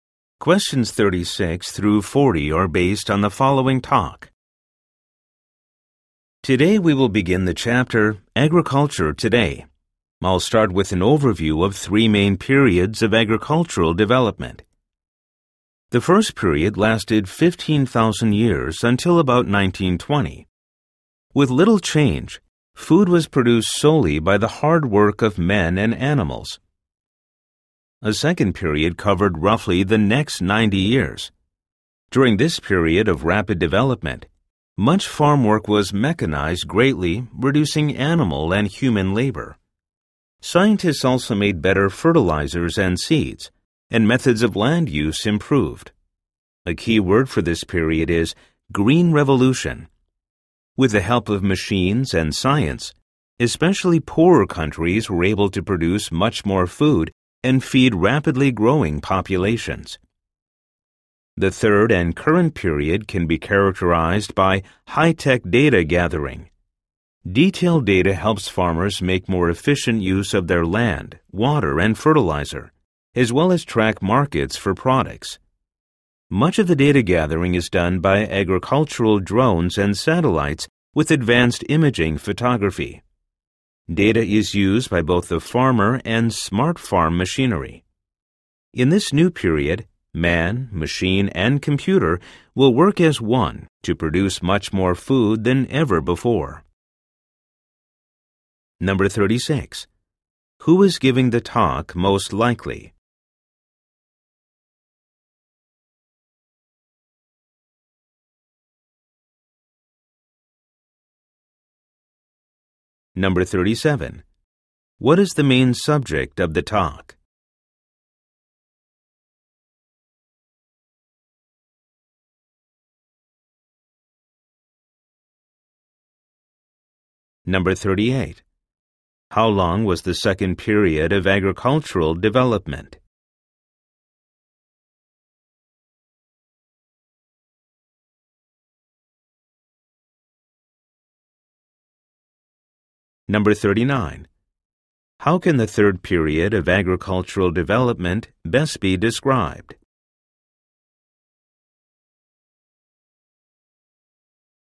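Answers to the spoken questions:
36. A teacher (professor)
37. The periods of agricultural development
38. About 90 years
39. High-tech data gathering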